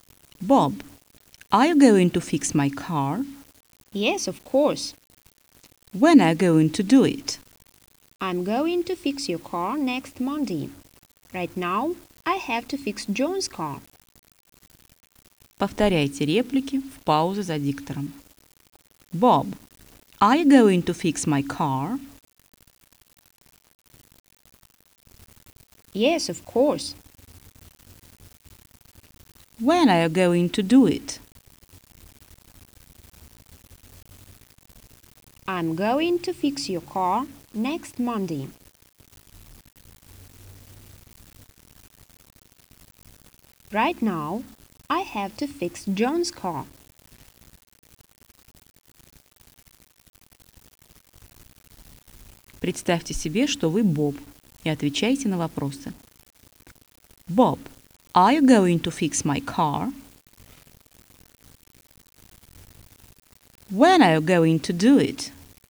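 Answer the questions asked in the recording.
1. Yes, of course.
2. Next Monday.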